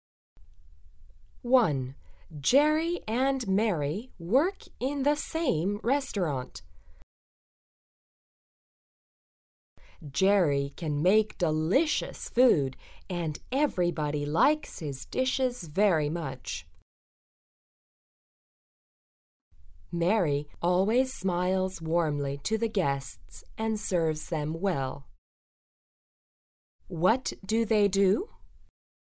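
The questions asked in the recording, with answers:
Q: What do they do?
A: Jerry is a cook and Mary is a waitress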